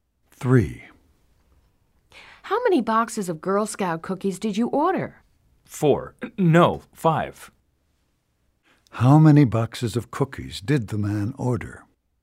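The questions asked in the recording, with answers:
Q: How many boxes of cookies did the man order?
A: Five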